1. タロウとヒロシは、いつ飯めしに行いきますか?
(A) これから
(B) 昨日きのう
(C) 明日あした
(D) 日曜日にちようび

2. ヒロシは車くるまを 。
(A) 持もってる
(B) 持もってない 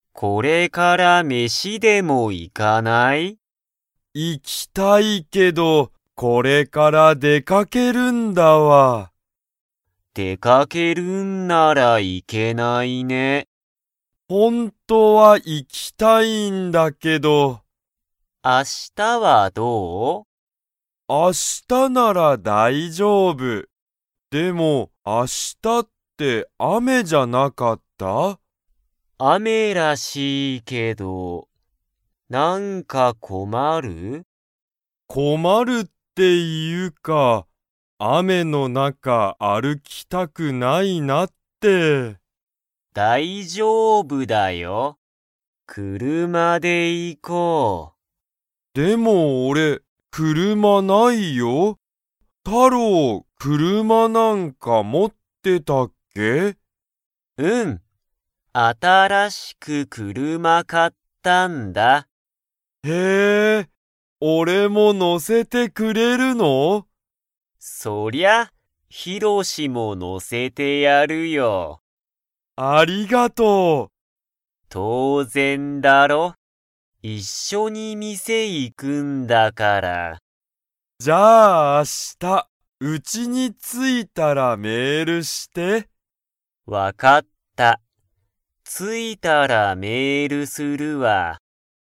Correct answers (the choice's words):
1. 明日あした
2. 持もってない

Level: Level 3